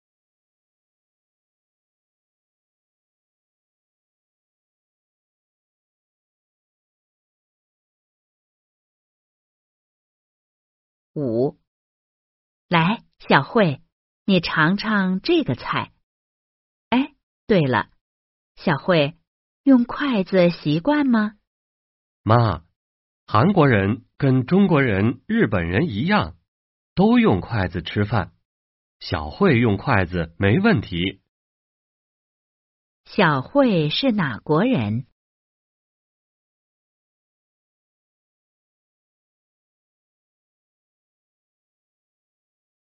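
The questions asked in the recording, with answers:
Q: 小慧是哪国人?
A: 韩国人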